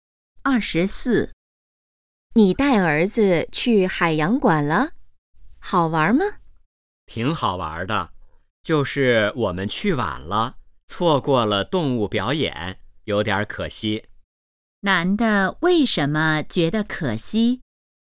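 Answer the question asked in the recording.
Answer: 错过了动物表演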